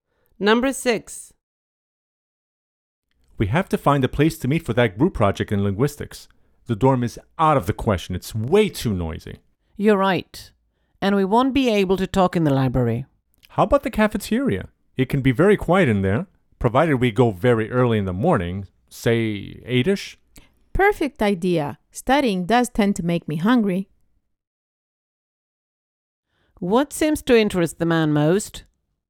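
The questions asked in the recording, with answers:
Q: What seems to interest the man most?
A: Eating / food in the cafeteria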